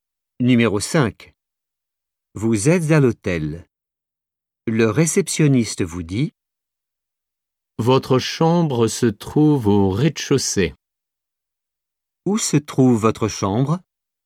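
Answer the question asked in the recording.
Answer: au rez-de-chaussée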